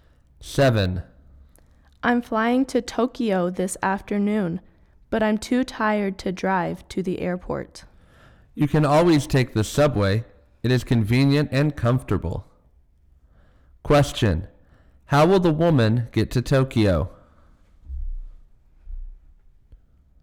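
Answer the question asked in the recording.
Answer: By plane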